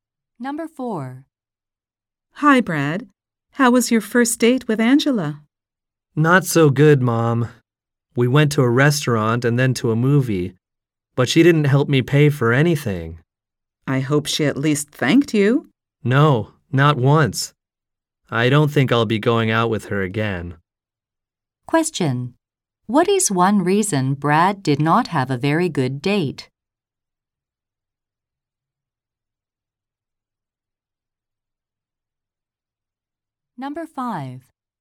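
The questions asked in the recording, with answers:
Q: What is one reason Brad did not have a very good date?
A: Angela didn't help him pay or thank him.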